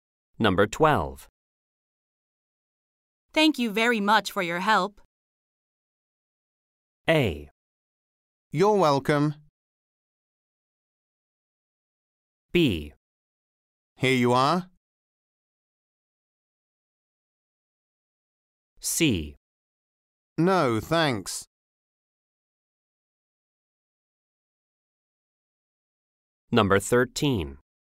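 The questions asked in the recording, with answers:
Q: Thank you very much for your help.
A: A: You're welcome.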